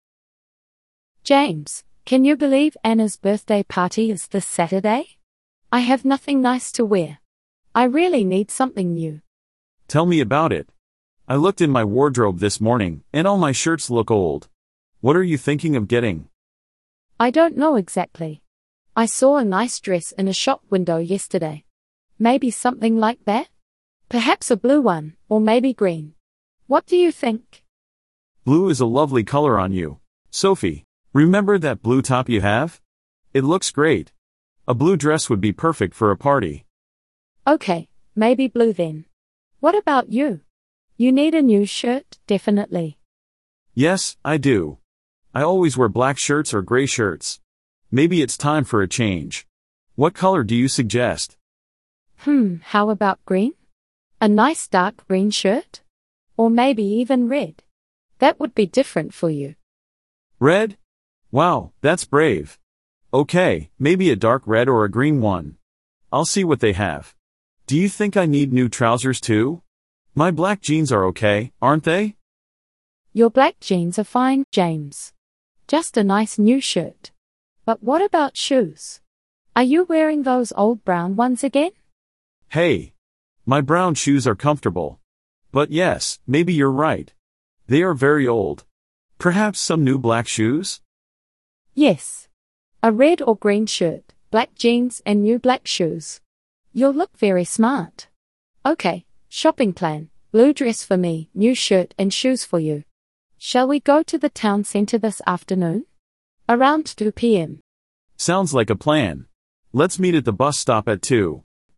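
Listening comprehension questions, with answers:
Read the sentences below. Are they True or False? Choose the correct answer.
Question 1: The party is on Sunday.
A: False

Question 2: Sophie wants to buy a new skirt.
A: False

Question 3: James wants to buy new trousers.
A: False

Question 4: James's brown shoes are new.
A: False

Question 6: They plan to go shopping tomorrow.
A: False

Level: Beginner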